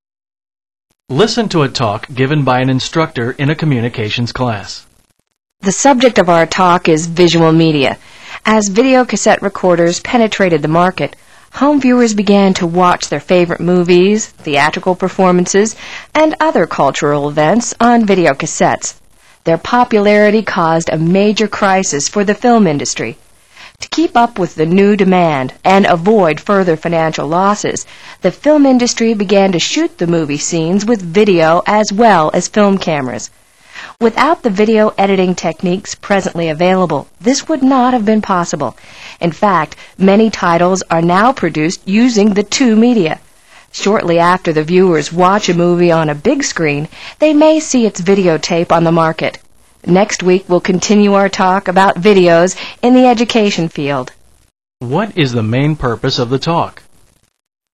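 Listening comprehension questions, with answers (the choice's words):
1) What is the main purpose of the talk?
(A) To analyze a few movie production techniques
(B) To explain the effects of VCRs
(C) To give statistical data for VCRs' growing market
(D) To promote the film industry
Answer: To explain the effects of VCRs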